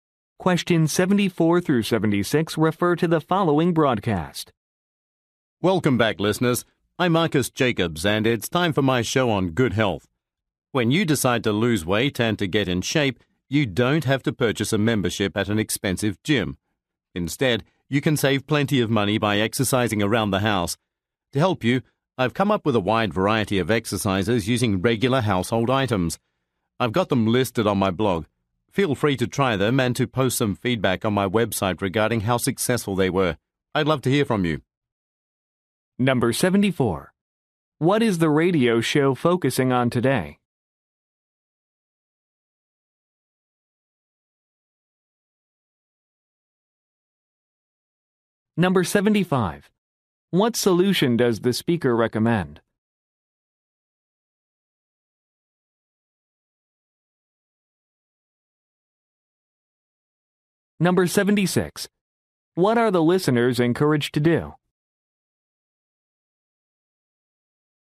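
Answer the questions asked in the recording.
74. Losing weight and getting in shape by exercising at home
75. Exercising around the house with household items
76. Post feedback on his website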